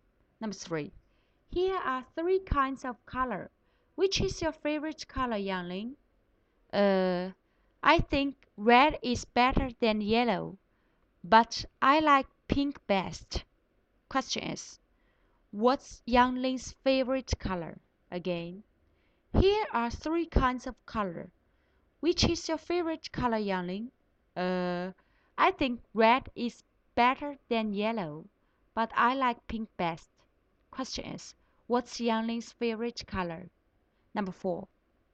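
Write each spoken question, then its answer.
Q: what's Yangling's favorite color?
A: Pink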